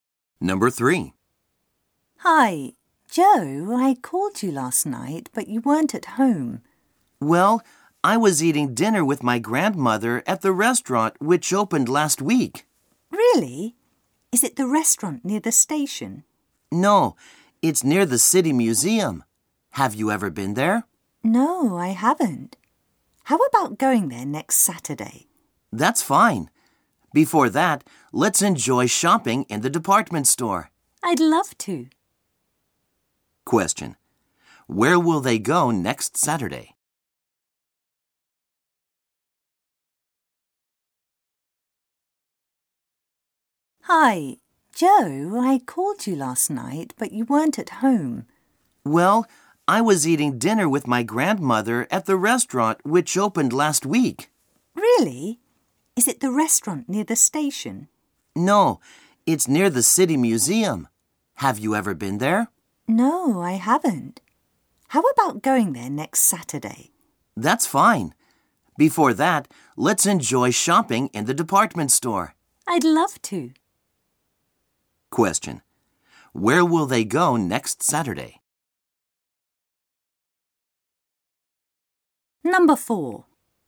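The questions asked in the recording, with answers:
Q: Where will they go next Saturday?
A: The department store and the new restaurant near the City Museum.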